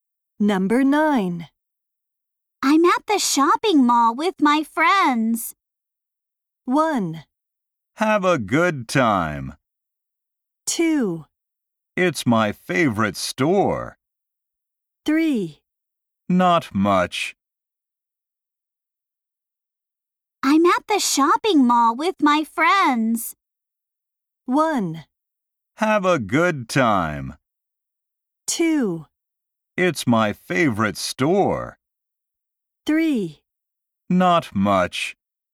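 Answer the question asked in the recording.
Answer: 1: Have a good time.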